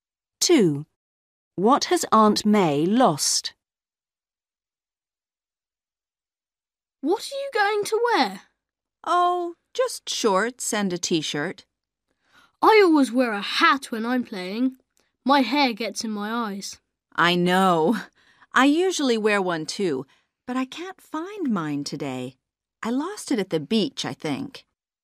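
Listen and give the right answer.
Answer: Her hat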